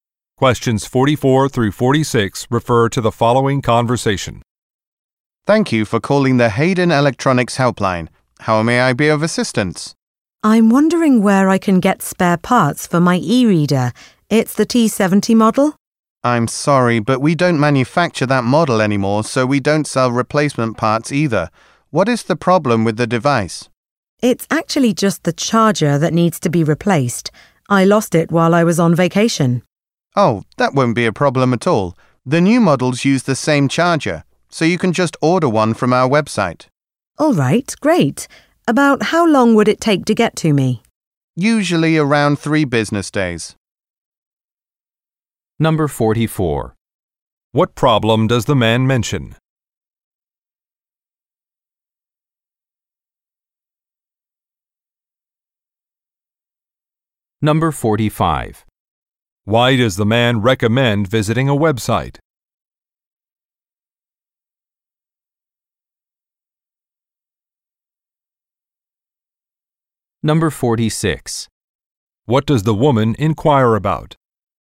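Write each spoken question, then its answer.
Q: What problem does the man mention?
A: He lost his e-reader charger

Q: Why does the man recommend visiting a website?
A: To order a charger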